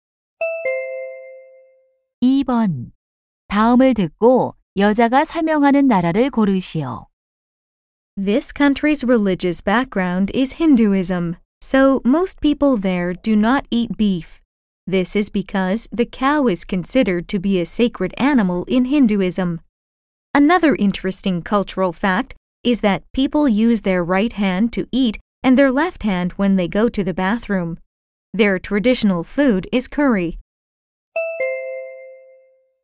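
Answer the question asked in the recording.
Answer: 인도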